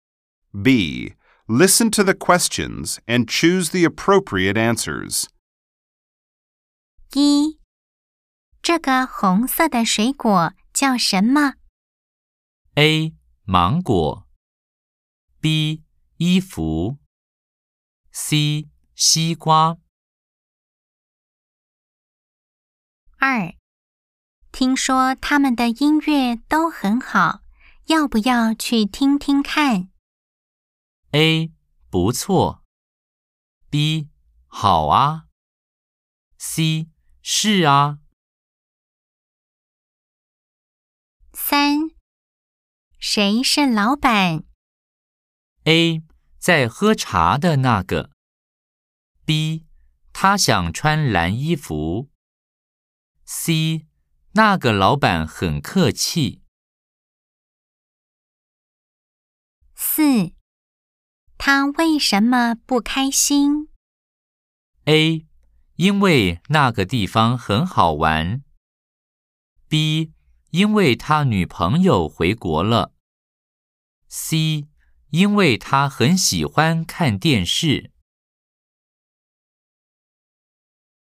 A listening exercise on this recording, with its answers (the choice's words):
B. Nghe câu hỏi và chọn câu trả lời thích hợp.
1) 這個紅色的水果叫什麼?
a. 芒果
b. 衣服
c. 西瓜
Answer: 西瓜

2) 聽說他們的音樂都很好,要不要去聽聽看?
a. 不錯!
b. 好啊!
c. 是啊!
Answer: 好啊!

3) 誰是老闆?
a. 在喝茶的那個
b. 他想穿藍衣服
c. 那個老闆很客氣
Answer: 在喝茶的那個

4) 他為什麼不開心?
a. 因為那個地方很好玩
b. 因為他女朋友回國了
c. 因為他很喜歡看電影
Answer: 因為他女朋友回國了